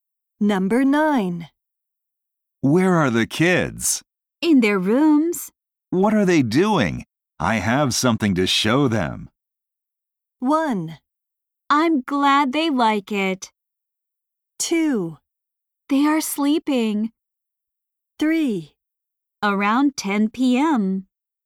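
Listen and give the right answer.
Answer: 2: They are sleeping.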